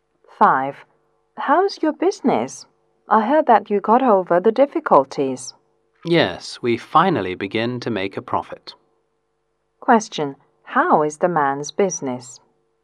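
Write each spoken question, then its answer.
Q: Question. How is the man's business?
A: It is beginning to make a profit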